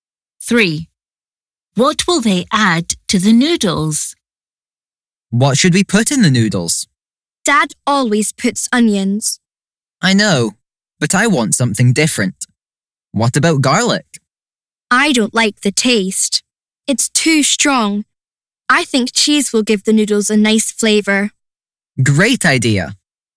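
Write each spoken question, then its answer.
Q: What will they add to the noodles?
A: Cheese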